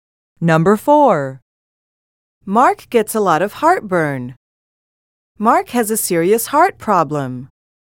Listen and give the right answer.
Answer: Different is the correct answer.